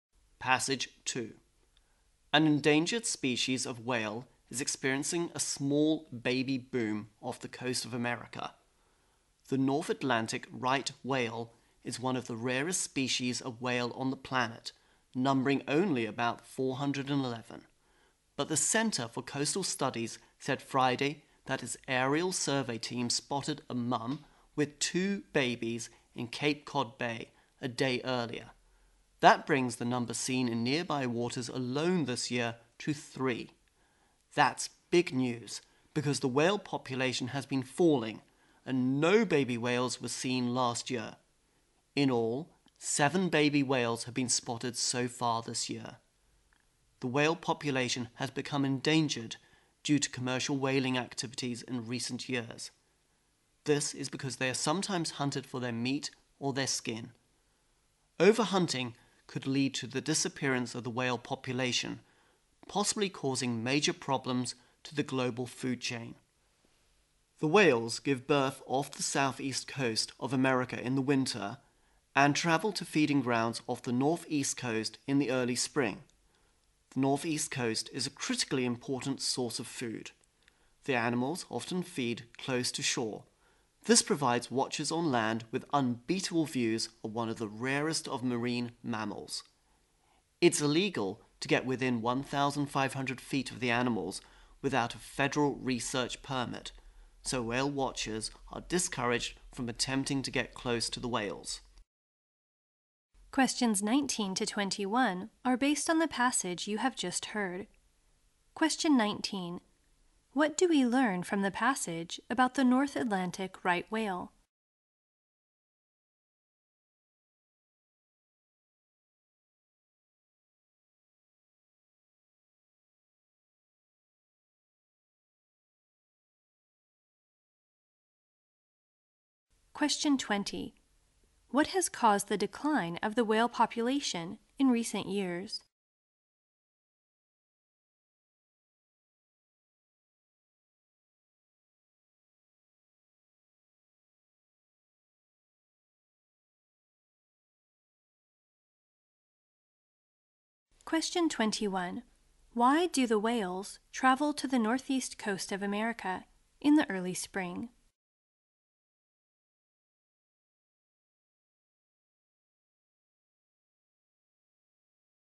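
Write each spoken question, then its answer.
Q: What do we learn from the passage about the North Atlantic right whale?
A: It is one of the rarest whale species, numbering about 411

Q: What has caused the decline of the whale population in recent years?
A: Commercial whaling

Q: Why do the whales travel to the northeast coast of America in the early spring?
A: To feed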